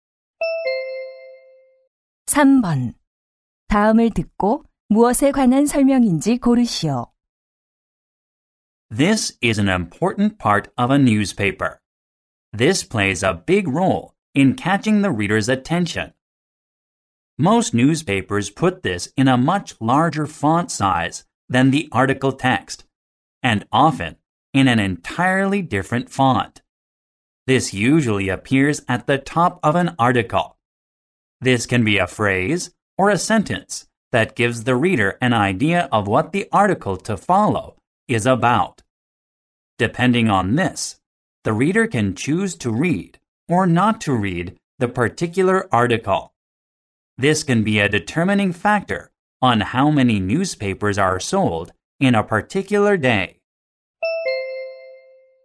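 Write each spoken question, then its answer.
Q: 다음을 듣고 무엇에 관한 설명인지 고르시오.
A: 신문 기사의 제목(헤드라인)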